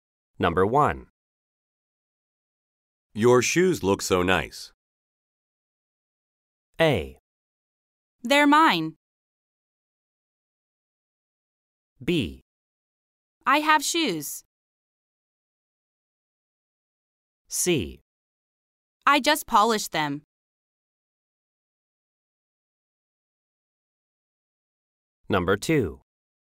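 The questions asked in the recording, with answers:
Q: Your shoes look so nice.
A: C: I just polished them.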